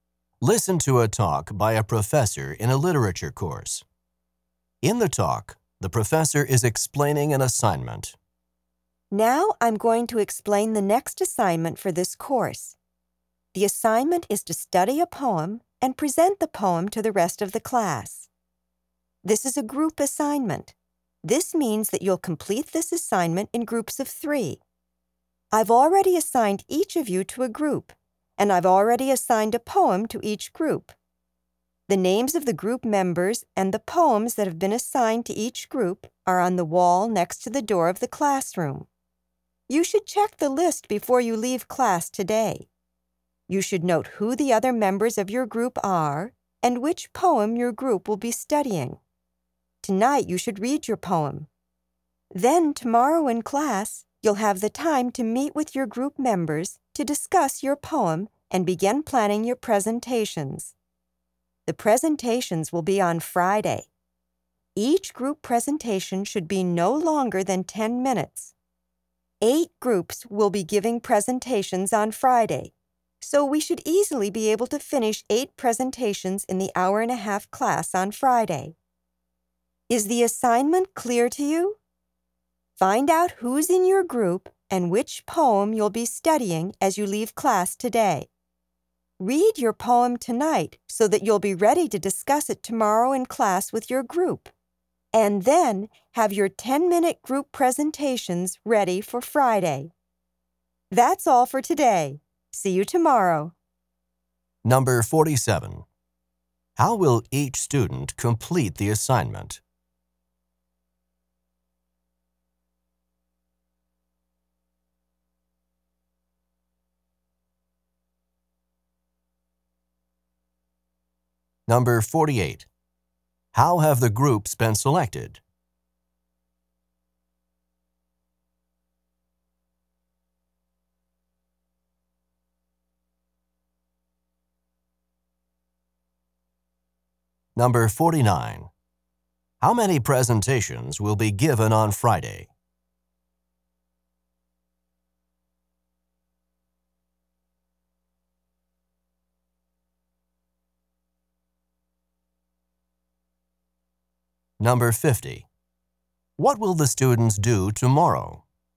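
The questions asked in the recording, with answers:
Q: How will each student complete the assignment?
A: In a group of three

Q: How have the groups been selected?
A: The professor assigned them

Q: How many presentations will be given on Friday?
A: Eight

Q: What will the students do tomorrow?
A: Meet with their groups to discuss the poem and plan presentations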